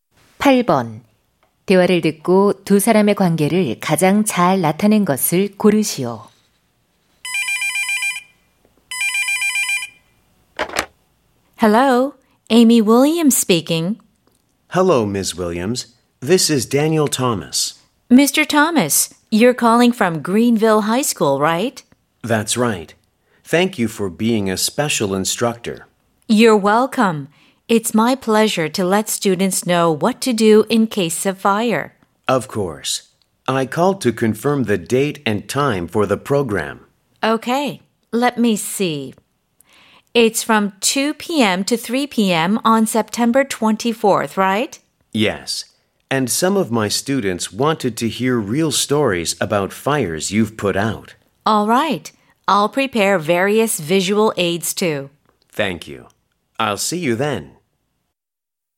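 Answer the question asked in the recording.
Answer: 교사 - 소방관(특별 강사)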